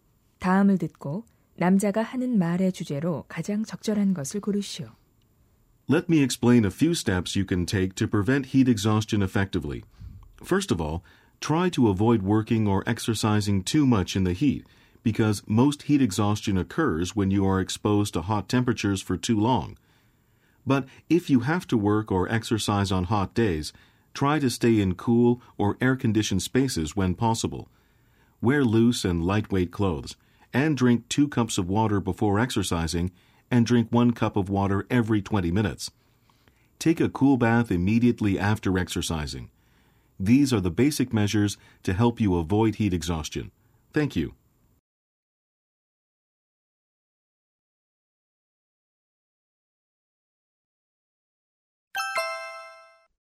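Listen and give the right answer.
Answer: 열사병(열탈진)을 예방하는 방법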